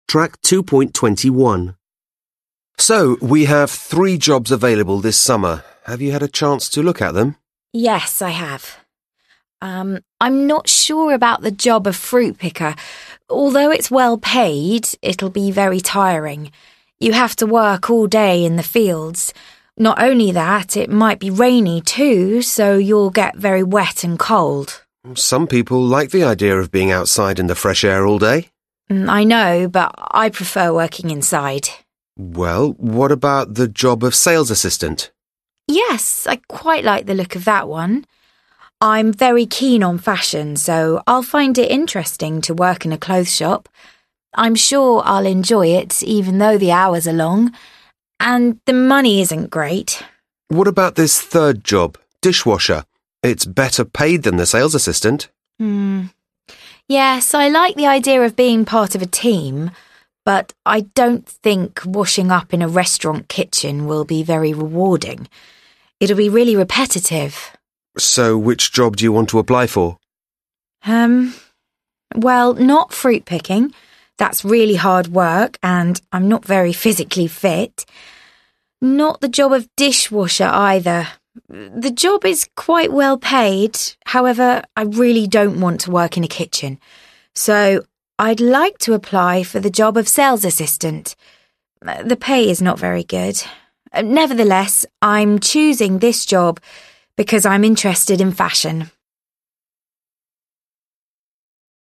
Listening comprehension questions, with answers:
Listen to a conversation between an examiner and a candidate who wants to get a holiday job in order to save some money. Answer the questions.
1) Which job does the candidate choose?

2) What is her main reason for choosing it?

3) What are her main reasons for not choosing the other two jobs?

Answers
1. She chooses sales assistant.
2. She's interested in fashion.
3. Fruit-picking is hard work and she isn't physically fit. She doesn't want to work in a kitchen, so she won't apply to be a dish-washer.

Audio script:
Examiner: So, we have three jobs available this summer. Have you had a chance to look at them?
Candidate: Yes, I have. I'm not sure about the job fruit-pickers. Although it's well-paid, it will be very tiring. You have to work all day in the fields. Not only that, it might be rainy, too, so you'll get very wet and cold.
Examiner: Some people like the idea of being outside in the fresh air all day.
Candidate: I know, but I prefer working inside.
Examiner: Well, what about the job of sales assistant?
Candidate: Yes, I quite like the look of that one. I'm very keen on fashion so I'll find it interesting to work in a clothes shop. I'm sure I'll enjoy it even though the hours are long. And the money isn't great ...
Examiner: What about this third job: dish-washer. It's better paid than the sales assistant.
Candidate: Hmm. Yes, I like the idea of being part of a team. But I don't think washing up in a restaurant kitchen will be very rewarding. It will be really repetitive.
Examiner: So, which job do you want to apply for?
Candidate: Hmm. Well, not fruit-picking. That's really hard work, and I'm not very physically fit! Not the job of dish-washer either. The job is quite well-paid. However, I really don't want to work in a kitchen. So I'd like to apply for the job of sales assistant. The pay is not very good. Nevertheless, I'm choosing this job because I'm interested in fashion.

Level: Lớp 10